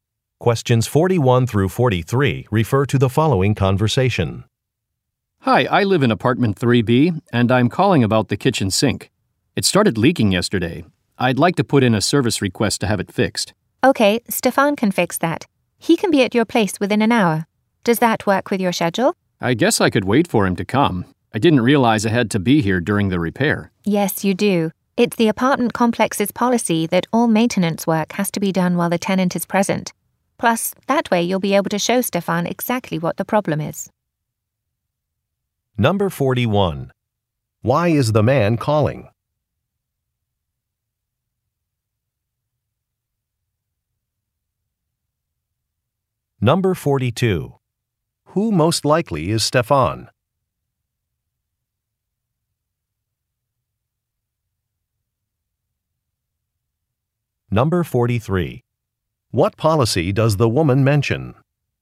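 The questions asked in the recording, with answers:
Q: Why is the man calling?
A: To request a repair for a leaking kitchen sink

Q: Who most likely is Stefan?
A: A maintenance worker

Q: What policy does the woman mention?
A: Tenants must be present during maintenance work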